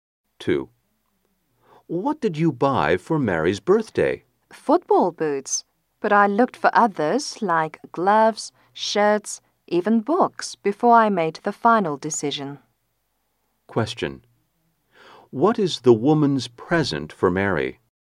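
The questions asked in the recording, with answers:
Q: What is the woman's present for Mary?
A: Football boots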